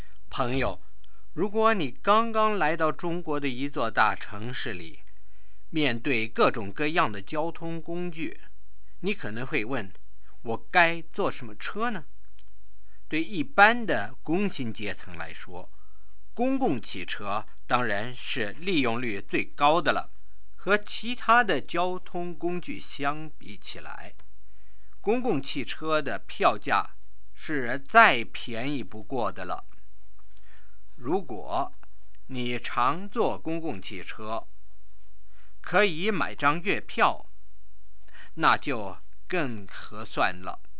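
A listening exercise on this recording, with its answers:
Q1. What is the cheapest way to travel?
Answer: By public bus, especially with a monthly pass.

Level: 2nd Year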